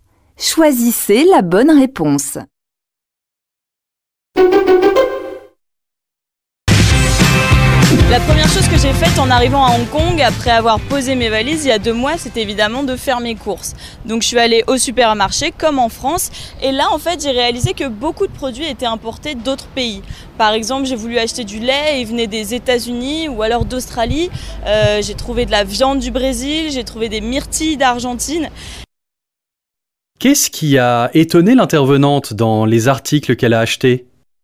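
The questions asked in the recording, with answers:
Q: Qu'est-ce qui a étonné l'intervenante dans les articles qu'elle a achetés ?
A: Beaucoup de produits étaient importés d'autres pays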